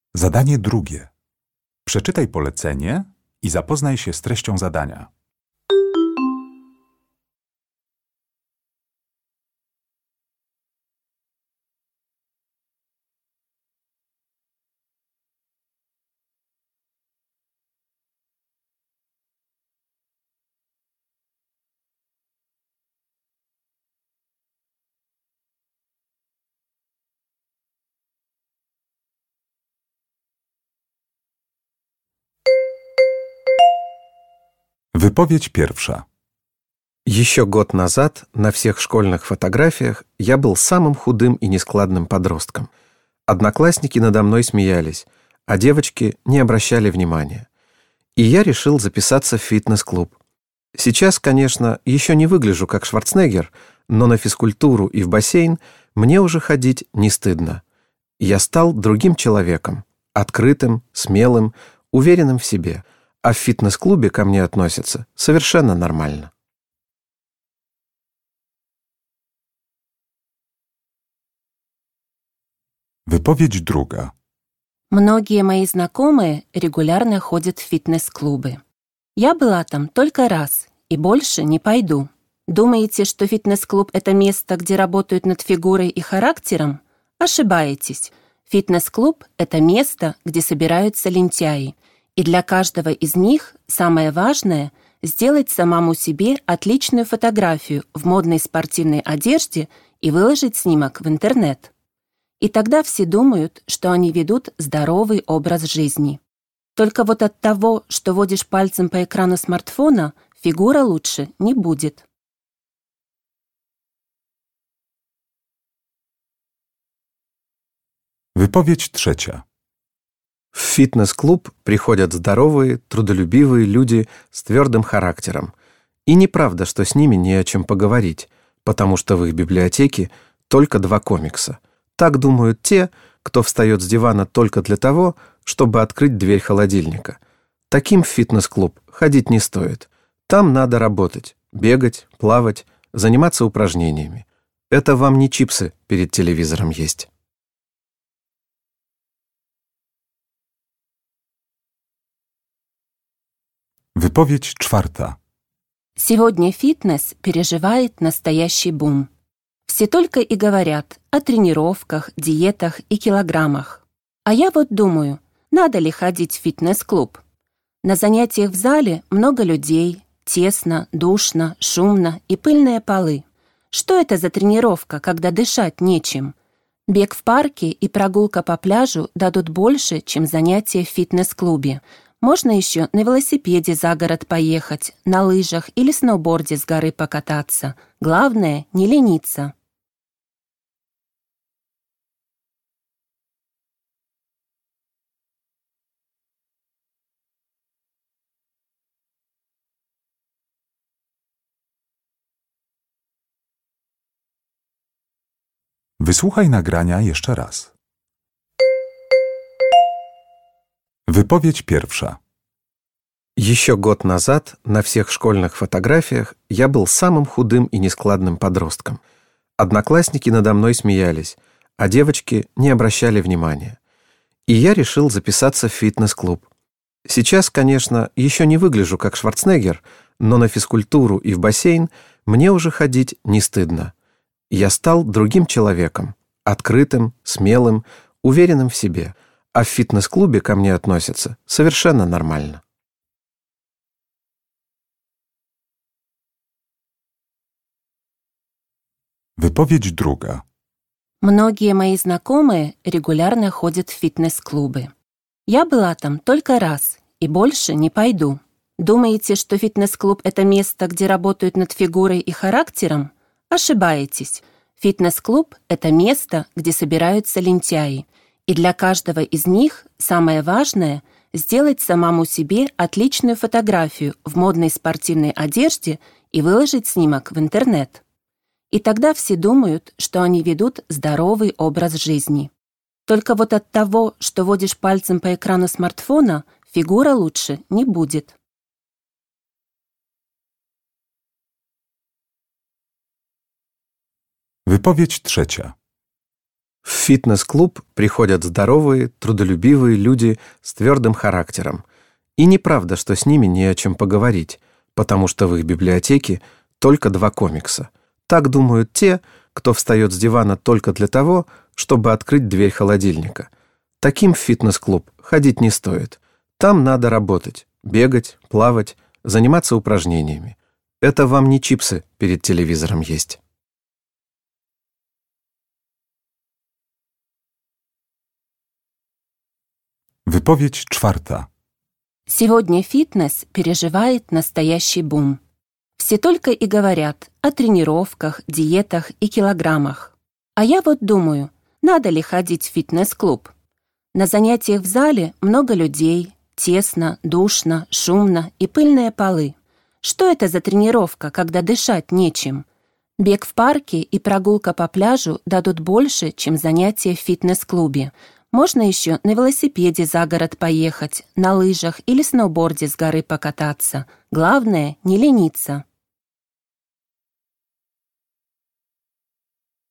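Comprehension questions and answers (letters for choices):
Uruchamiając odtwarzacz z oryginalnym nagraniem CKE usłyszysz dwukrotnie cztery wypowiedzi na temat fitnessu. Na podstawie informacji zawartych w nagraniu dopasuj do każdej wypowiedzi (2.1.–2.4.) odpowiadające jej zdanie (A–E).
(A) Фитнес-клубы – не для ленивых.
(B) Мне нравится активный отдых на свежем воздухе.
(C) Занятия в фитнес-клубе изменили мой характер.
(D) Во время тренировок я всегда делаю фотографии.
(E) В фитнес-клубы приходят только любители селфи.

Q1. wypowiedź 1.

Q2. wypowiedź 2.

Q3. wypowiedź 3.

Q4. wypowiedź 4.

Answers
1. C
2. E
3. A
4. B

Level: egzamin ósmoklasisty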